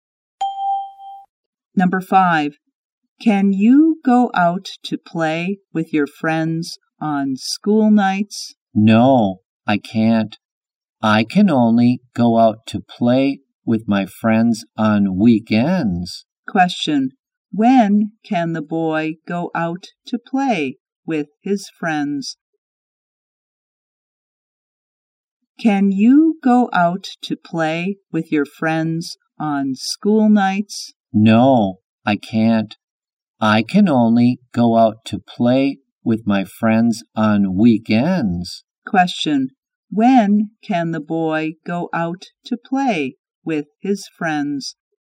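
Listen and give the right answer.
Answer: On weekends.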